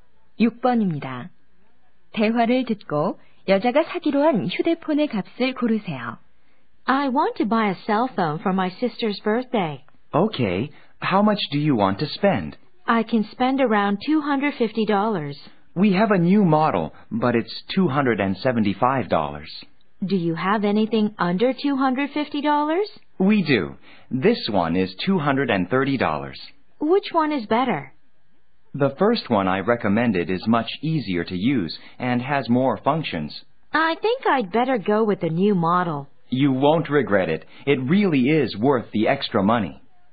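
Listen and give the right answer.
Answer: 275달러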